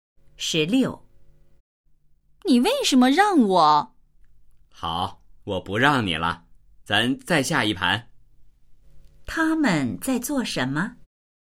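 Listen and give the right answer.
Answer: 下棋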